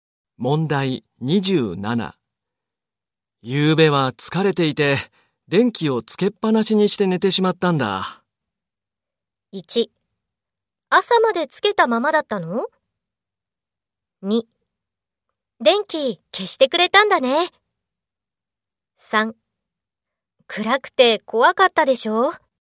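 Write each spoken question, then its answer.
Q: 夕べは疲れていて、電気をつけっぱなしにして寝てしまったんだ。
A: 1: 朝までつけたままだったの?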